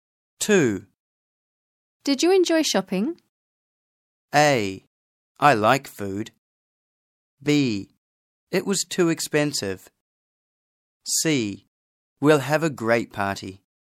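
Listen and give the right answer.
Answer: B: It was too expensive.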